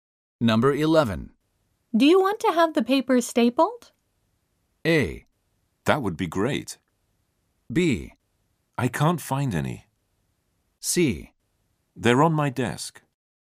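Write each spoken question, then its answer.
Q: Do you want to have the paper stapled?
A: A: That would be great.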